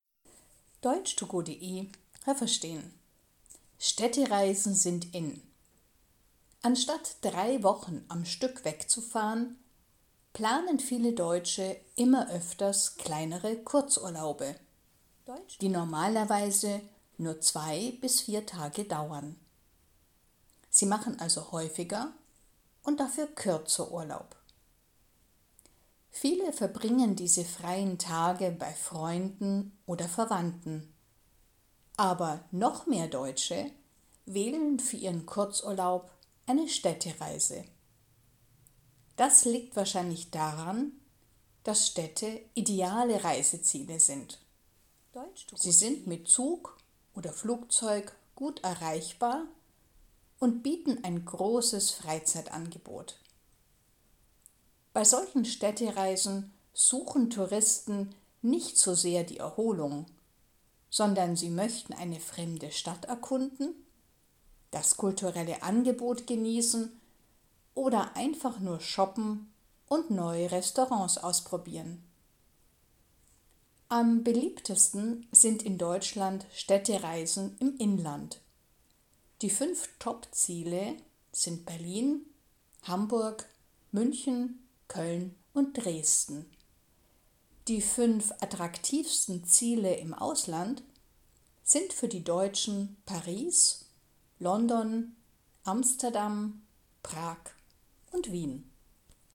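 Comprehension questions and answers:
Was haben Sie gehört? Es gibt nur eine korrekte Antwort.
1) Die Deutschen planen immer öfters ...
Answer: kleinere Kurzurlaube, die nur 2 bis 4 Tage dauern

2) Die beliebteste Form eines Kurzurlaubs ist ...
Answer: eine Städtereise

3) Städte sind gute Reiseziele, ...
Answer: weil sie mit Zug oder Flugzeug gut erreichbar sind und ein großes Freizeitangebot bieten

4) In Städten möchten die Touristen ...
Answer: eine fremde Stadt erkunden, Kultur genießen, shoppen oder neue Restaurants ausprobieren

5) Am beliebtesten sind in Deutschland Städtereisen ...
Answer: im Inland

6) Zu den 5 beliebtesten Städten in Deutschland gehört auch ...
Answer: Berlin, Hamburg, München, Köln oder Dresden

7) Zu den 5 beliebtesten Städten im Ausland gehört auch ...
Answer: Paris, London, Amsterdam, Prag oder Wien

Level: Hörtexte A (einfach)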